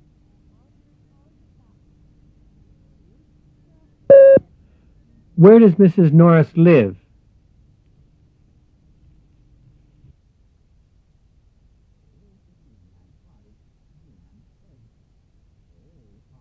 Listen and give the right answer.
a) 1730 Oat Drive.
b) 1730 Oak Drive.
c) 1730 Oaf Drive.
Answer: b) 1730 Oak Drive.